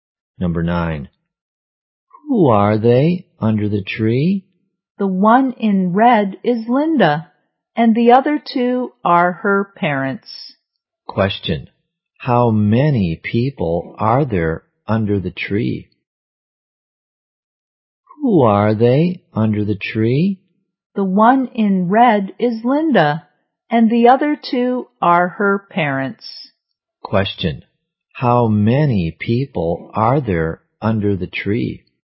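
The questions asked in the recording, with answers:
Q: How many people are there under the tree?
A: Three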